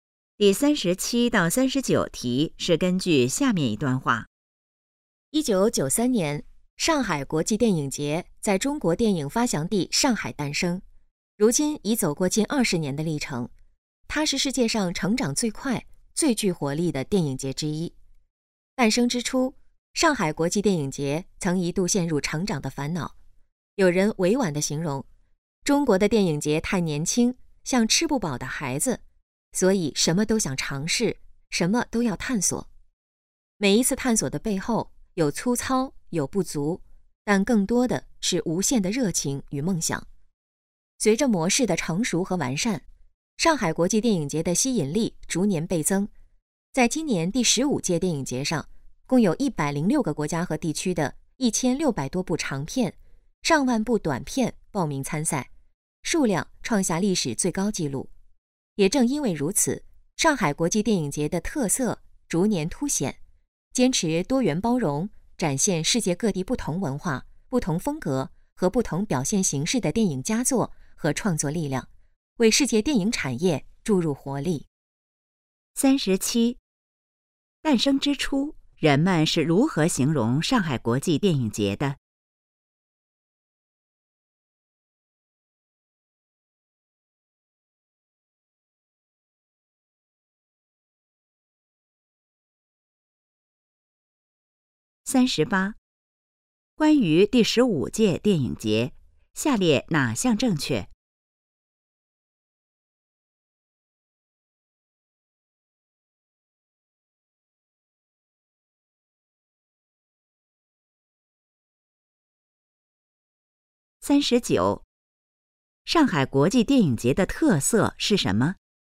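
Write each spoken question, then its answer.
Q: 诞生之初,人们是如何形容上海国际电影节的?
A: 像吃不饱的孩子

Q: 上海国际电影节的特色是什么?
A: 坚持多元包容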